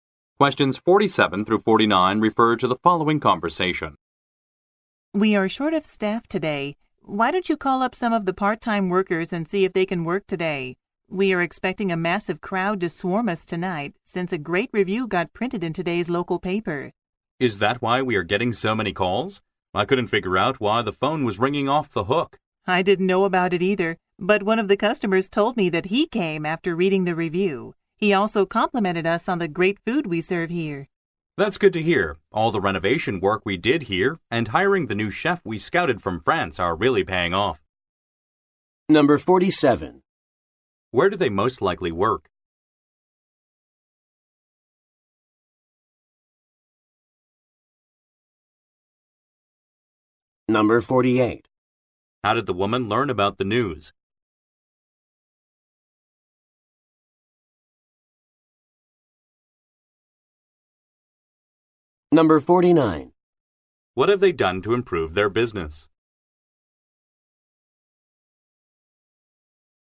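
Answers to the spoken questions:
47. At a restaurant
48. A customer told her
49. Renovated and hired a new chef from France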